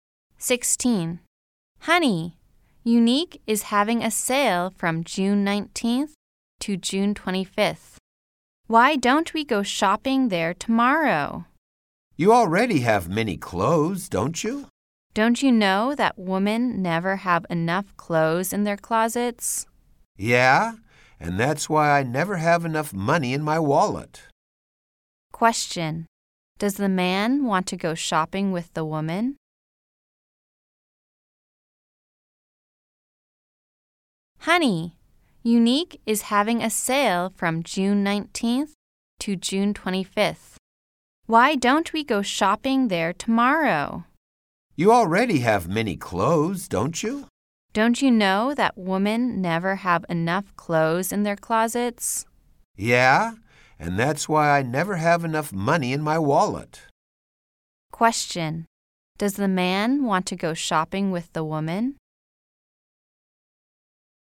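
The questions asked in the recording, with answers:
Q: Question. Does the man want to go shopping with the woman?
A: No, he doesn't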